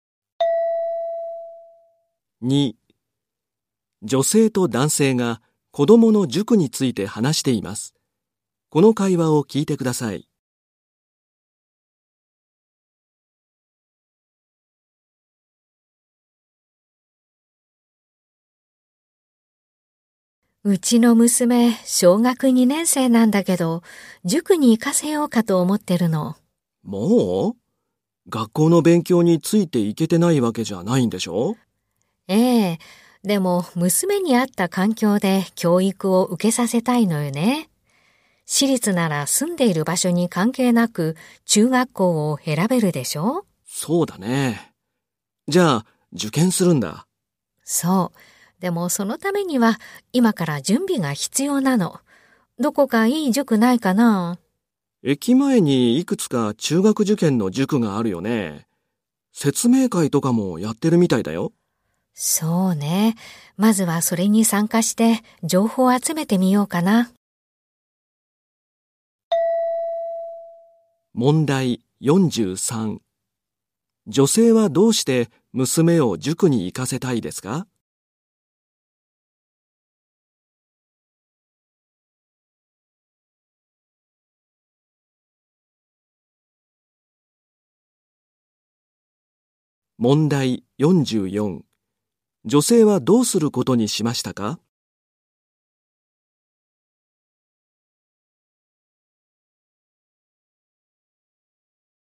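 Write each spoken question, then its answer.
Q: 女性はどうして娘を塾に行かせたいですか?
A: 私立中学を受験させるため(娘に合った環境で教育を受けさせたい)

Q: 女性はどうすることにしましたか?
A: 塾の説明会に参加して情報を集める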